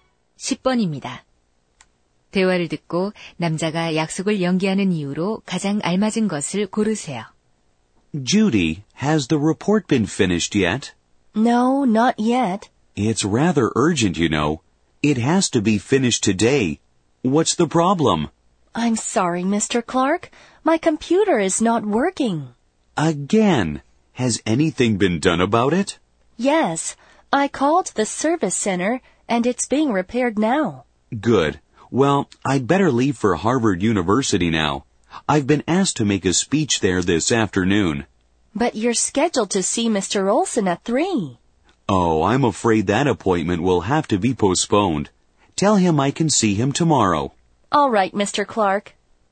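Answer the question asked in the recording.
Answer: 하버드 대학교에서 연설을 해야 해서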